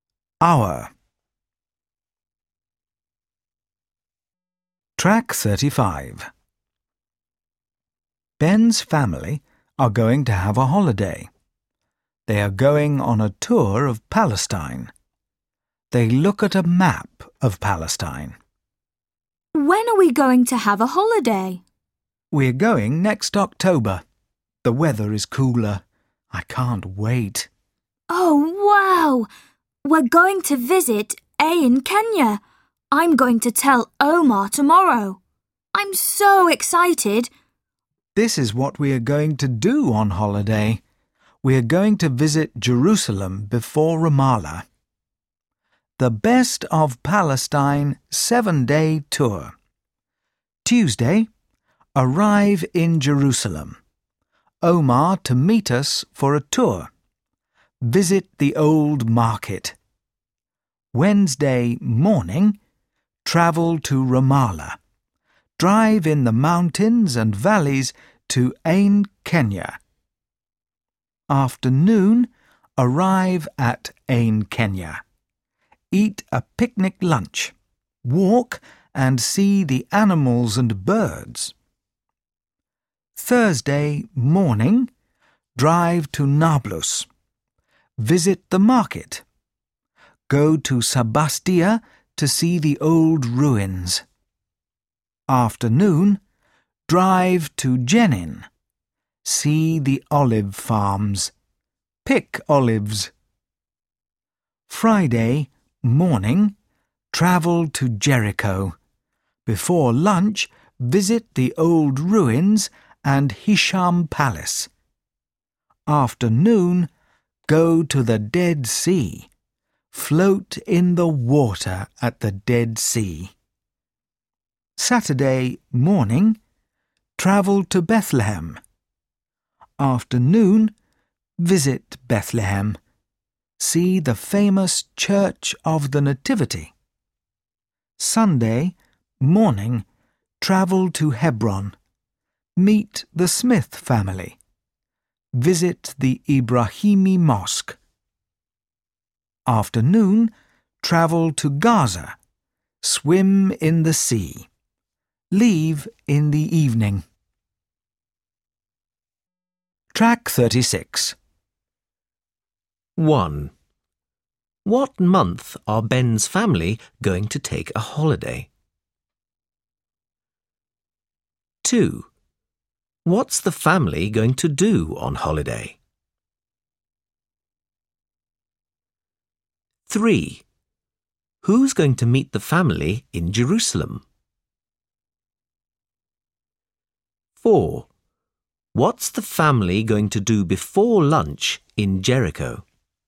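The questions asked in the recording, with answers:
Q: What month are Ben's family going to take a holiday?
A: October

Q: What's the family going to do on holiday?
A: Go on a tour of Palestine

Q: Who's going to meet the family in Jerusalem?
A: Omar

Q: What's the family going to do before lunch in Jericho?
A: Visit the old ruins and Hisham Palace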